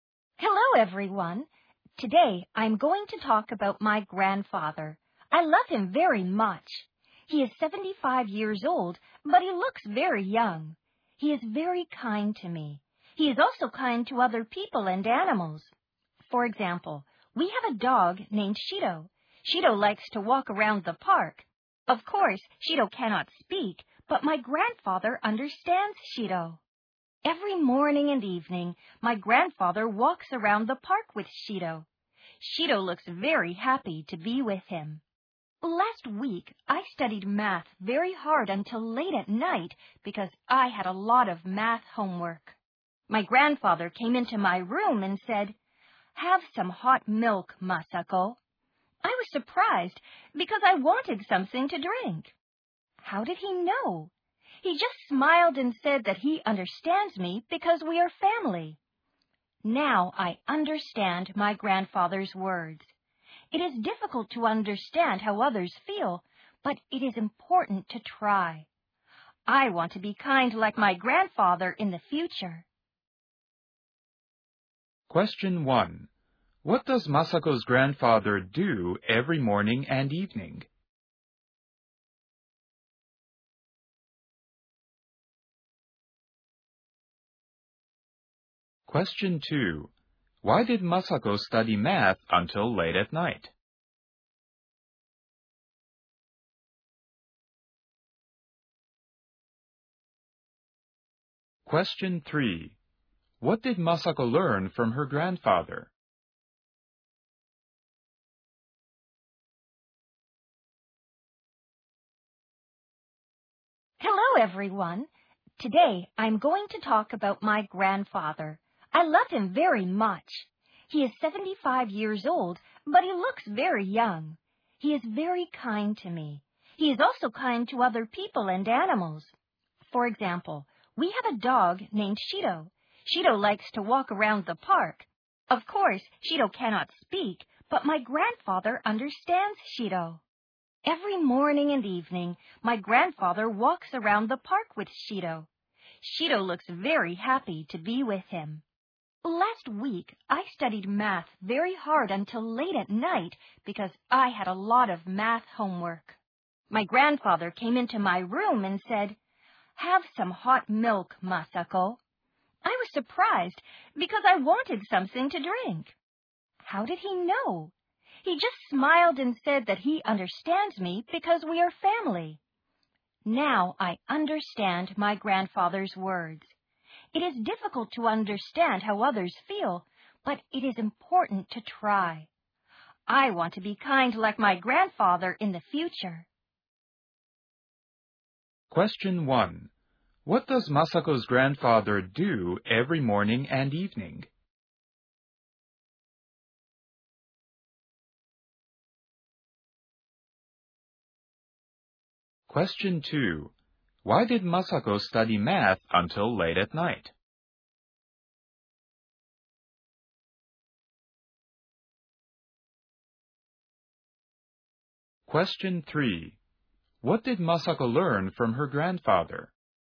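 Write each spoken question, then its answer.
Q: What does Masako's grandfather do every morning and evening?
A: He walks around the park with Shido.

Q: Why did Masako study math until late at night?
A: Because she had a lot of math homework.

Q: What did Masako learn from her grandfather?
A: It is important to try to understand how others feel.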